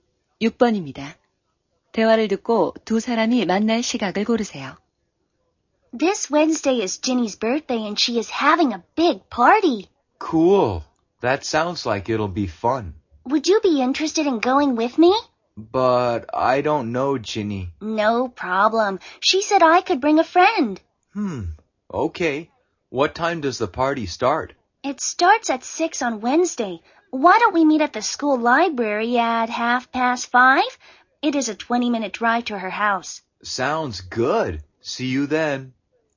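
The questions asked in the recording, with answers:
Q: 대화를 듣고 두 사람이 만날 시각을 고르세요.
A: 5시 30분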